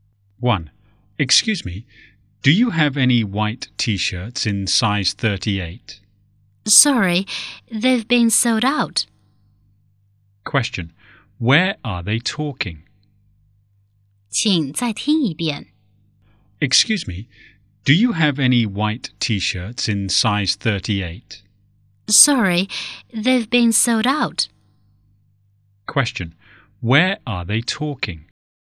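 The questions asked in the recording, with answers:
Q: Question, where are they talking?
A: In a clothes shop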